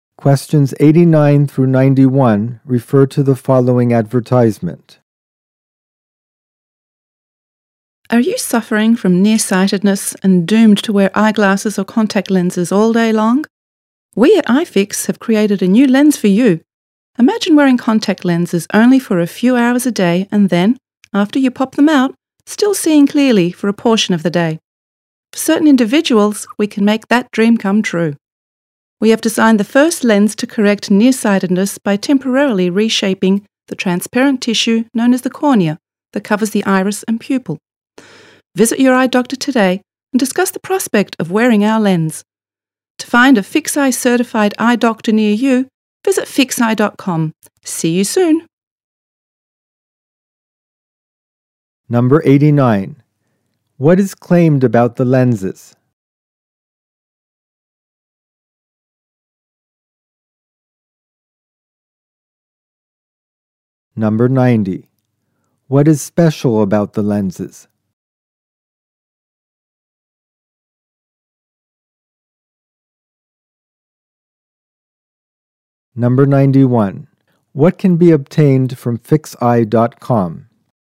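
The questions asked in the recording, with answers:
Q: What can be obtained from FixEye.com?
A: A list of certified eye doctors nearby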